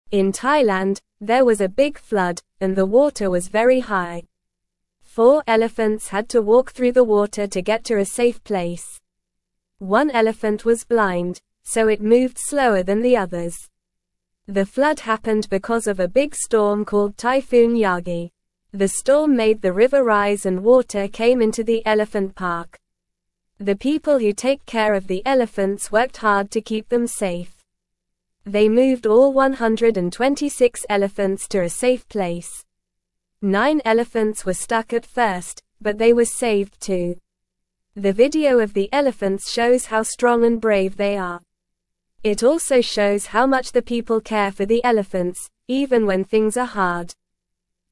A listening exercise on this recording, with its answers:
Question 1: In Thailand, there was a big (1)______, and the water was very high.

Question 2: Four elephants had to walk through the water to get to a safe (2)______.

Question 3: The flood happened because of a big storm called (3)______ Yagi.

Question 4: The storm made the river rise and water came into the elephant (4)______.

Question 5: The people who take (5)______ of the elephants worked hard to keep them safe.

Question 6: They (6)______ all 126 elephants to a safe place.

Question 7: The video of the elephants (7)______ how strong and brave they are.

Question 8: It also shows how much the (8)______ care for the elephants, even when things are hard.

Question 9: Why did the flood happen in Thailand?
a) Because of a big storm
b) Because of a drought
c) Because of a heatwave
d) Because of a snowstorm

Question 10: How many elephants had to walk through the water?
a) Five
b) Four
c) Three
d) Six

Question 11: Why did one elephant move slower than the others?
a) Because it was scared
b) Because it was tired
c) Because it was blind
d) Because it was hungry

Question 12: What was the name of the storm that caused the flood?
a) Hurricane Maria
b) Typhoon Yagi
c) Tornado Johnson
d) Blizzard Smith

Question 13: How many elephants were stuck at first?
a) Ten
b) Eight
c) Eleven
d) Nine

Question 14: How many elephants were moved to a safe place?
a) 126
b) 100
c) 150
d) 200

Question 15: What does the video of the elephants show?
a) How fast they can run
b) How big they are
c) How loud they can trumpet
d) How strong and brave they are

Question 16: What did the people who take care of the elephants do to keep them safe?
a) Left them in the flood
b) Gave them food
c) Moved them to a safe place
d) Ignored them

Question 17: Nine elephants were stranded but were not rescued.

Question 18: People abandoned 126 elephants during the flood.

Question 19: Elephants were not required to wade through high water in Thailand.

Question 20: The elephants were strong and brave in the video.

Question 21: One elephant was blind and moved slower.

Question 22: The video showed how much people care for the elephants.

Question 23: A big storm called Typhoon Yagi caused the flood.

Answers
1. flood
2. place
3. Typhoon
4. park
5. care
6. moved
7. shows
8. people
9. a
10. b
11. c
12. b
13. d
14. a
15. d
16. c
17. False
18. False
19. False
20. True
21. True
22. True
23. True

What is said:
In Thailand, there was a big flood, and the water was very high. Four elephants had to walk through the water to get to a safe place. One elephant was blind, so it moved slower than the others. The flood happened because of a big storm called Typhoon Yagi. The storm made the river rise and water came into the elephant park.
The people who take care of the elephants worked hard to keep them safe. They moved all 126 elephants to a safe place. Nine elephants were stuck at first, but they were saved too. The video of the elephants shows how strong and brave they are. It also shows how much the people care for the elephants, even when things are hard.

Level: Level 1

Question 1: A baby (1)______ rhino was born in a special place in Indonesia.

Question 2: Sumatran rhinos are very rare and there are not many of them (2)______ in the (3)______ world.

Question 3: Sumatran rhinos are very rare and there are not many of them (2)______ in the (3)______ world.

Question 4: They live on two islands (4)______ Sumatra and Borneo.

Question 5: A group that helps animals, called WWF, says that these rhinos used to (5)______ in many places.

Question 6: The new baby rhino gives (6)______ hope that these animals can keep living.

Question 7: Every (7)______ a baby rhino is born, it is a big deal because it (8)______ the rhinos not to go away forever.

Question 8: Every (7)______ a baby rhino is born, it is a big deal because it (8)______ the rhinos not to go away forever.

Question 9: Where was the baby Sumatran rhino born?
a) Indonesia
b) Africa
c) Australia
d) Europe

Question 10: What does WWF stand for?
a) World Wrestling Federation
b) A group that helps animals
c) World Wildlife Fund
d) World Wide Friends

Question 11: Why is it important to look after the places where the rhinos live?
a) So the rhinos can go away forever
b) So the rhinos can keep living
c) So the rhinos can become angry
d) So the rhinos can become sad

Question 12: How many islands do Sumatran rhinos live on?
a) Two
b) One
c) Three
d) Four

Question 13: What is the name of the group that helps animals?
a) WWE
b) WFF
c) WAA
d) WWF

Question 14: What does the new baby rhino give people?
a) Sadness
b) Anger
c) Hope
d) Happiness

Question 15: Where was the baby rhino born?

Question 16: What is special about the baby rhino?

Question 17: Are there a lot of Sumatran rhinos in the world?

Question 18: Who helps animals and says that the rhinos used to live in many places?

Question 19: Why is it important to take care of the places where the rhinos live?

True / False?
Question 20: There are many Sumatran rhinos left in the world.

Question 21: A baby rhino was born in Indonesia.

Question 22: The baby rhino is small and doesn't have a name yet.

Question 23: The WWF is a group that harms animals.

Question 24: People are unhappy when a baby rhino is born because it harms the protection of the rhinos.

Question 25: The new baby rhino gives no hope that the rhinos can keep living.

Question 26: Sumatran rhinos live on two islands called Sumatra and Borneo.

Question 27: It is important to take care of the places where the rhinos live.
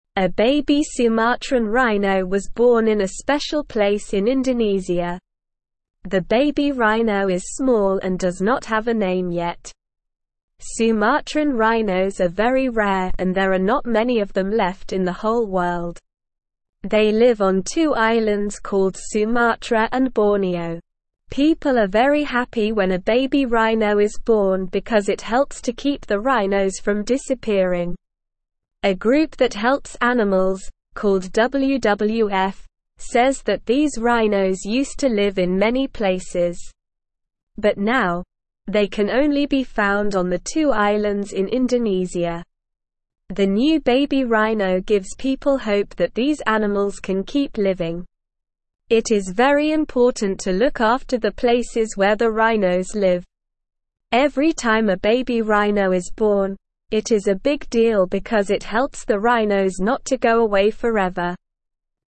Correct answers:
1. Sumatran
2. left
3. whole
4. called
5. live
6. people
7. time
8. helps
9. a
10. b
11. b
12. a
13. d
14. c
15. The baby rhino was born in Indonesia.
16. The baby rhino is small and doesn't have a name yet.
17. No, there are not many Sumatran rhinos left in the world.
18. WWF, a group that helps animals, says that the rhinos used to live in many places.
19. It is important to take care of the places where the rhinos live because it helps the rhinos not to go away forever.
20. False
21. True
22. True
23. False
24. False
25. False
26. True
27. True

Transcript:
A baby Sumatran rhino was born in a special place in Indonesia. The baby rhino is small and does not have a name yet. Sumatran rhinos are very rare and there are not many of them left in the whole world. They live on two islands called Sumatra and Borneo. People are very happy when a baby rhino is born because it helps to keep the rhinos from disappearing.
A group that helps animals, called WWF, says that these rhinos used to live in many places. But now, they can only be found on the two islands in Indonesia. The new baby rhino gives people hope that these animals can keep living. It is very important to look after the places where the rhinos live. Every time a baby rhino is born, it is a big deal because it helps the rhinos not to go away forever.

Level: Level 1

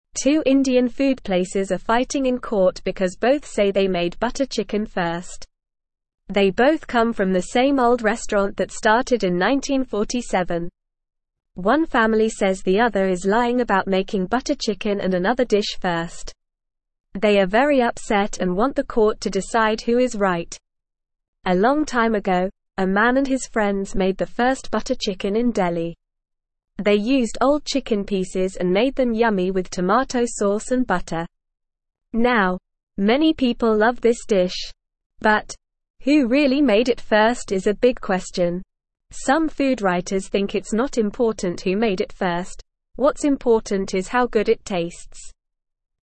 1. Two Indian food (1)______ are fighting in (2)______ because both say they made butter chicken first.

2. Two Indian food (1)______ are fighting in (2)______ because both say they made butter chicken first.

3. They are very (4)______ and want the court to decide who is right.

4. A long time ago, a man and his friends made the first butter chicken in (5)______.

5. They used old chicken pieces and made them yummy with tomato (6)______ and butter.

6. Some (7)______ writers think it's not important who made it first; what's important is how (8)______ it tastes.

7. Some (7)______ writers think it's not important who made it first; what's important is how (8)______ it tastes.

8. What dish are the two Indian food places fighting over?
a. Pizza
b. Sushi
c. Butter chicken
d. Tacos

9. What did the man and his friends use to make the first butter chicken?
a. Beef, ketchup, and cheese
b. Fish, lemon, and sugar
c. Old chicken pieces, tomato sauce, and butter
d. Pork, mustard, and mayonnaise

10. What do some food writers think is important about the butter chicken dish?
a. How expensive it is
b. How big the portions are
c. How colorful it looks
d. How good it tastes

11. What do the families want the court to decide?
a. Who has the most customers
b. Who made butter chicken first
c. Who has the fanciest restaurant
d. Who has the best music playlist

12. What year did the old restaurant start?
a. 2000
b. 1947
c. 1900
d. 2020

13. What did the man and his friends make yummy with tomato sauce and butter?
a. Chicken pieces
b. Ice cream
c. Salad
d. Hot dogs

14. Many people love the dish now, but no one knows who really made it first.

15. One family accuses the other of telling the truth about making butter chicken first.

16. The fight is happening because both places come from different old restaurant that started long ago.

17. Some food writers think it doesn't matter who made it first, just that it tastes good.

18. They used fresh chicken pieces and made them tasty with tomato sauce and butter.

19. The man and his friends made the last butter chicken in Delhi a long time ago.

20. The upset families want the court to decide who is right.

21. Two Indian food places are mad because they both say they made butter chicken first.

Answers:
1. places
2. court
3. upset
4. Delhi
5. sauce
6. food
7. good
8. c
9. c
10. d
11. b
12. b
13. a
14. True
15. False
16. False
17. True
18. False
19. False
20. True
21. True

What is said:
Two Indian food places are fighting in court because both say they made butter chicken first. They both come from the same old restaurant that started in 1947. One family says the other is lying about making butter chicken and another dish first. They are very upset and want the court to decide who is right.
A long time ago, a man and his friends made the first butter chicken in Delhi. They used old chicken pieces and made them yummy with tomato sauce and butter. Now, many people love this dish. But, who really made it first is a big question. Some food writers think it's not important who made it first; what's important is how good it tastes.

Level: Level 1

